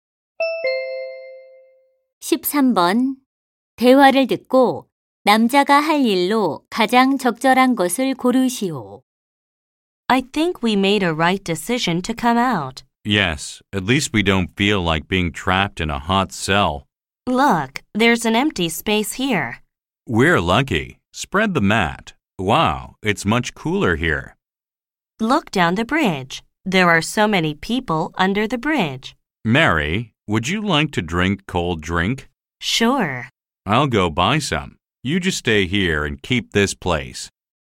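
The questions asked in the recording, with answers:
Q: 대화를 듣고 남자가 할 일로 가장 적절한 것을 고르시오.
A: 시원한 음료 사 오기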